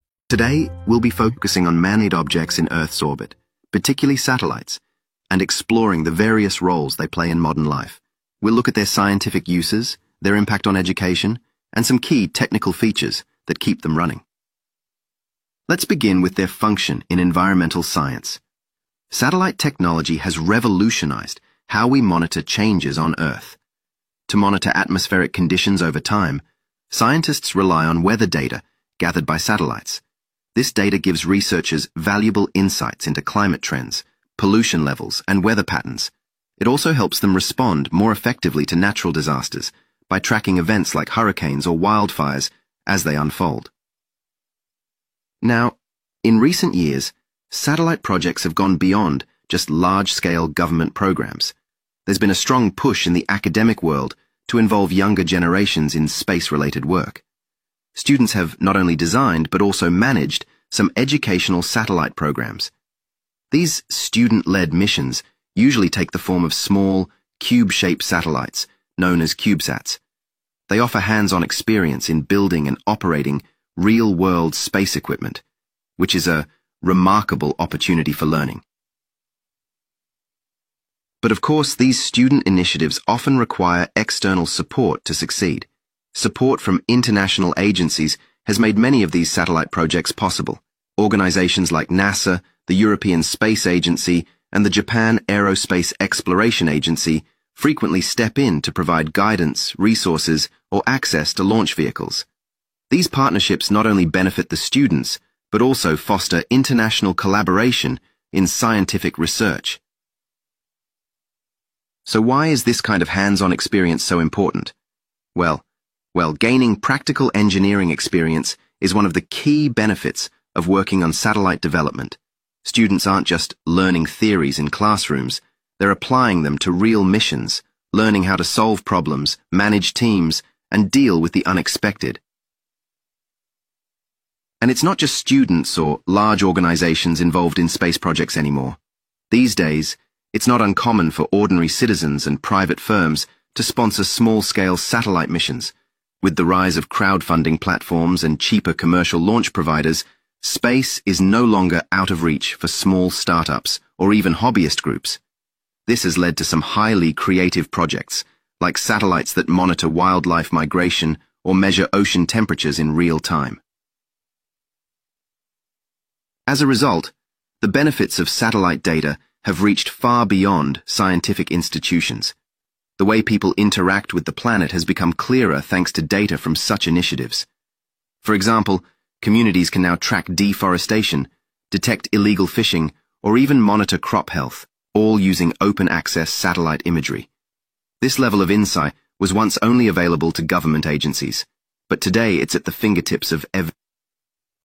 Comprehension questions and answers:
Complete the notes below. Write ONE WORD ONLY for each answer.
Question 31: Satellites can collect information to help scientists study changes in the 31..............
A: weather

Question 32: Some educational satellites have been built and even operated by 32..............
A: students

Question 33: These satellite projects often receive support from 33.............. space agencies.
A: international

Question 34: Satellites not only serve professional purposes, but also provide a valuable learning 34.............. for young engineers.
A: experience

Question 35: In some cases, private companies and ordinary 35.............. have funded small satellite missions.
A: citizens

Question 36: These projects have increased global awareness of how humans interact with the 36..............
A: planet